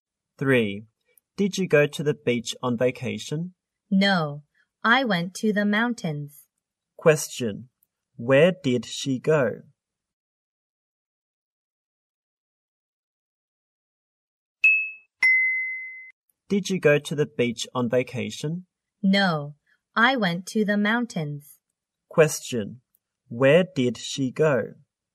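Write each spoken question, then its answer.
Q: Where did she go?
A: To the mountains.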